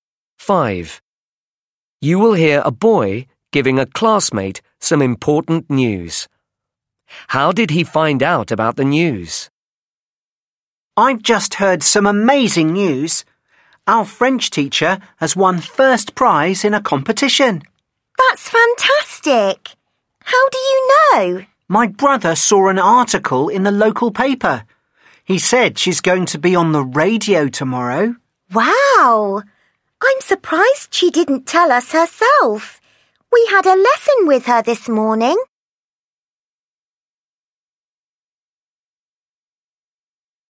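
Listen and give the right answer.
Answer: His brother saw an article in the local paper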